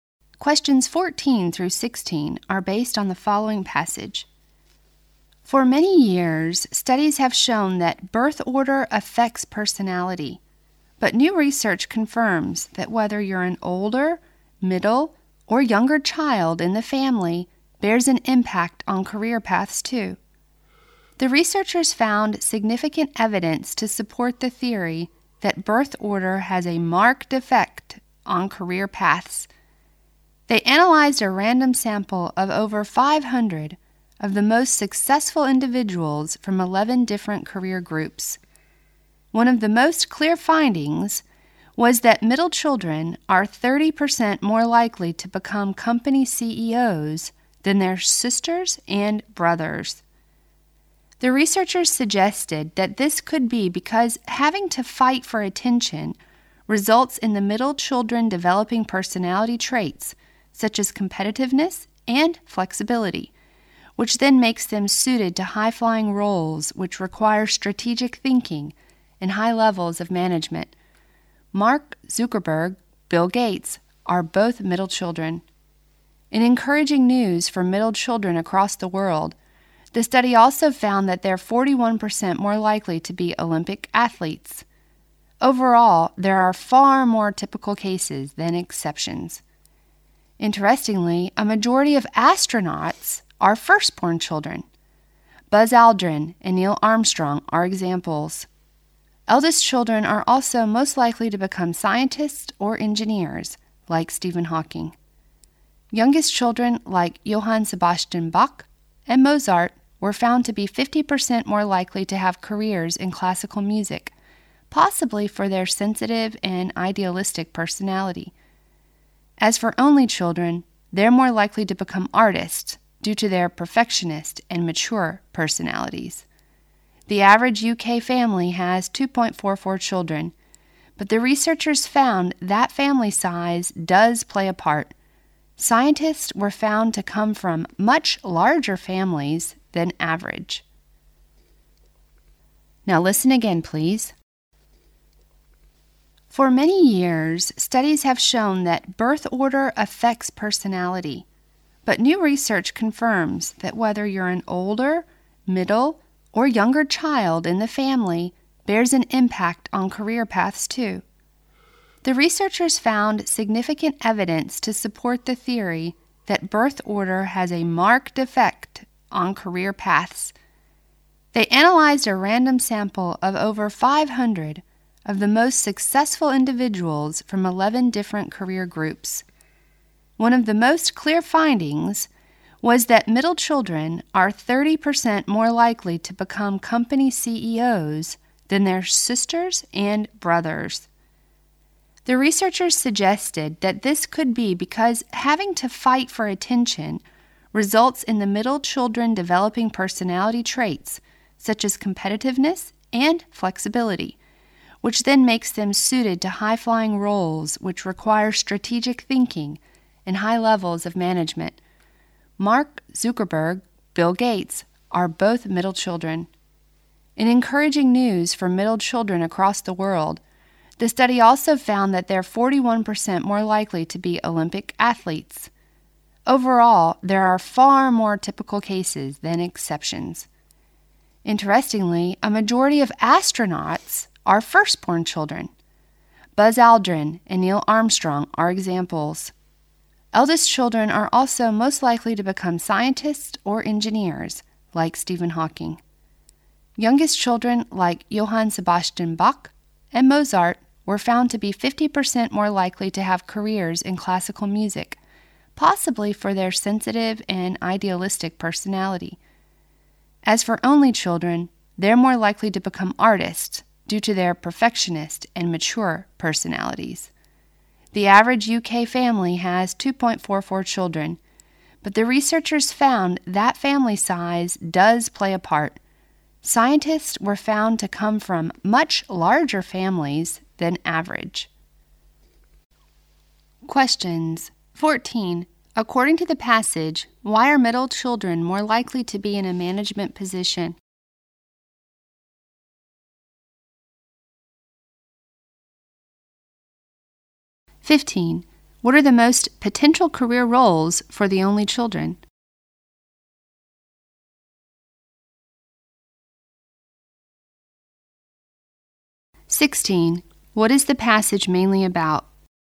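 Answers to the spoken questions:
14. Fighting for attention makes them competitive and flexible
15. Artists
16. How birth order affects career paths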